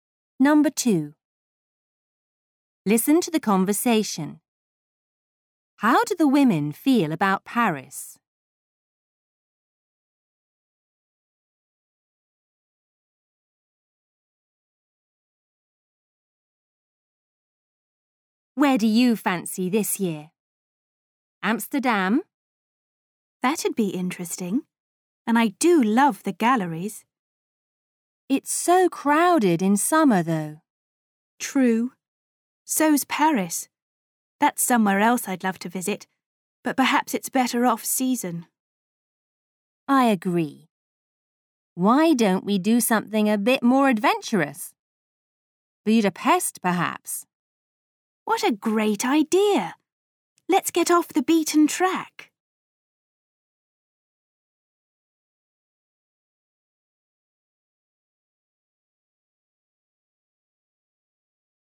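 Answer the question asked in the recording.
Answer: They would like to visit but it's better off season (too crowded in summer)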